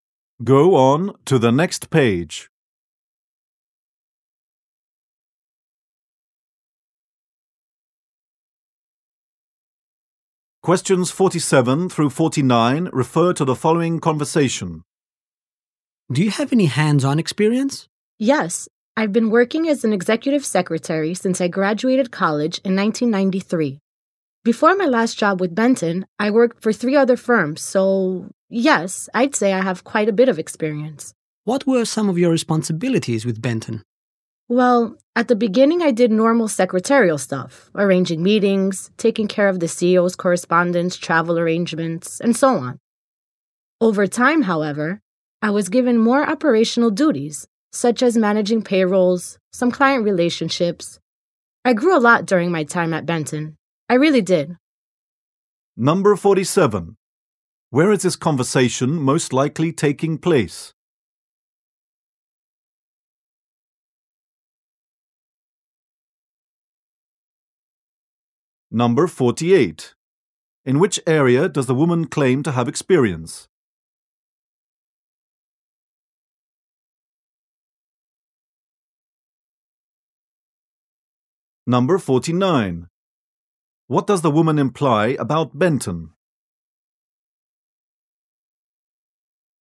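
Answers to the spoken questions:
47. At a job interview.
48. Executive secretary work.
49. She grew a lot there and was given more responsibilities.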